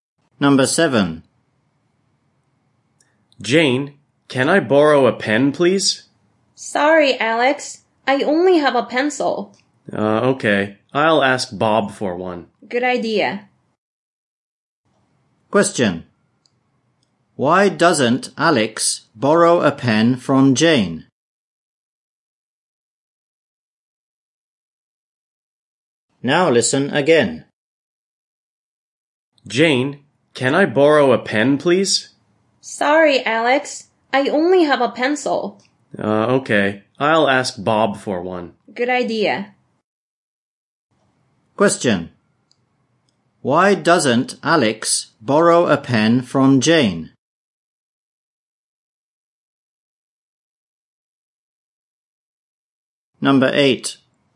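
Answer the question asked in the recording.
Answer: Jane only has a pencil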